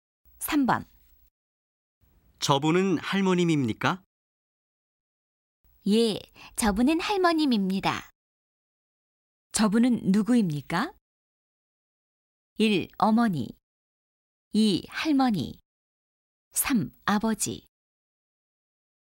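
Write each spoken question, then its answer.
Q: 저분은 누구입니까?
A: 2: 할머니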